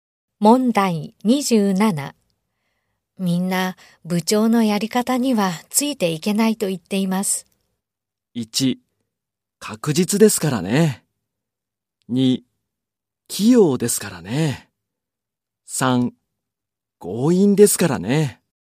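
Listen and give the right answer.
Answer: 3: 強引ですからね。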